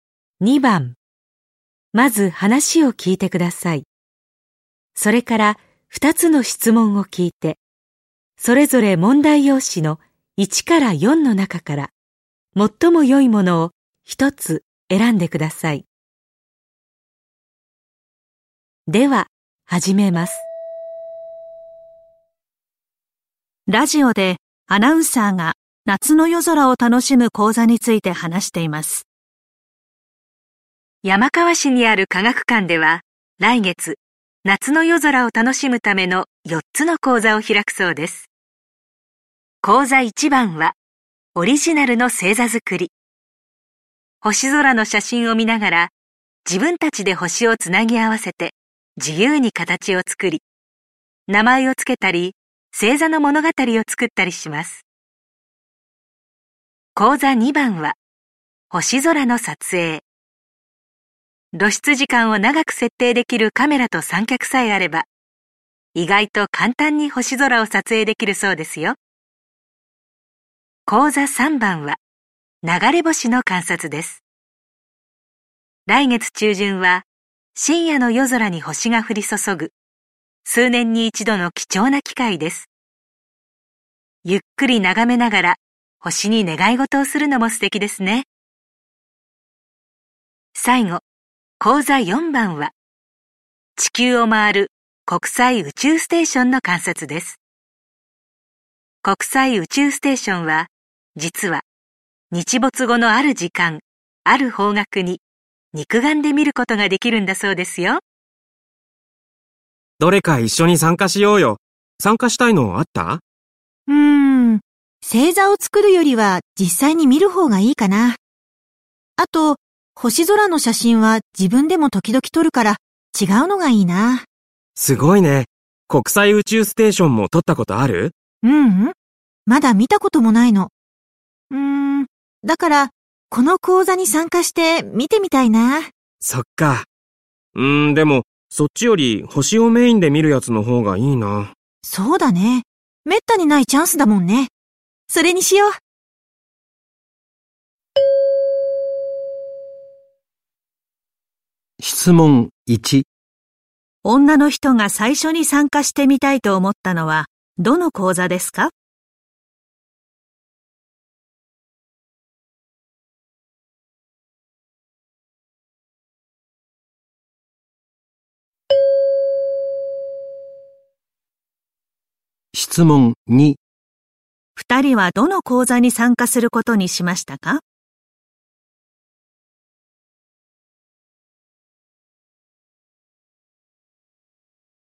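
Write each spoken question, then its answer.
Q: 女の人が最初に参加してみたいと思ったのは、どの講座ですか?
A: 講座4番:国際宇宙ステーションの観察

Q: 二人はどの講座に参加することにしましたか?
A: 講座3番:流れ星の観察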